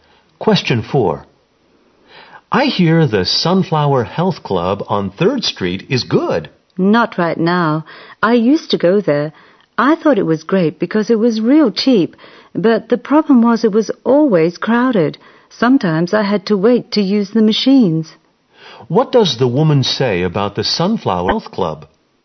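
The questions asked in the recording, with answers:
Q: What does the woman say about the Sunflower Health Club?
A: It is cheap but always crowded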